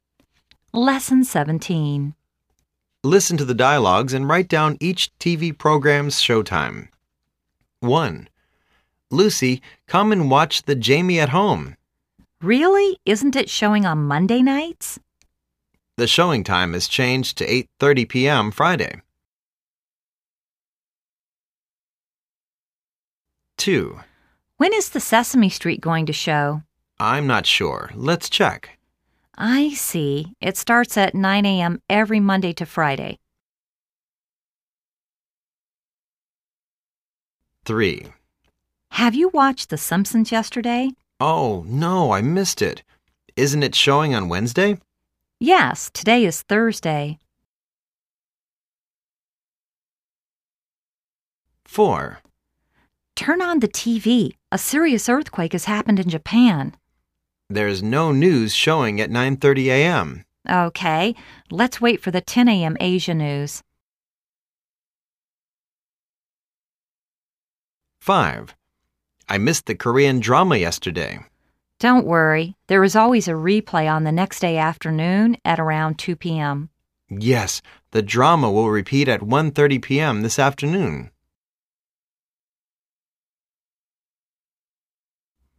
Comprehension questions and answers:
Listen to the dialogues and write down each TV program's Showtime.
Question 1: Jamie at Home______________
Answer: 8:30pm, Friday

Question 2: Sesame Street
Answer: 9:OOam, Monday to Friday

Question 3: The Simpson's ______________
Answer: Wednesday

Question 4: BBC News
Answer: 10am

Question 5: The Korean Drama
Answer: 1:30pm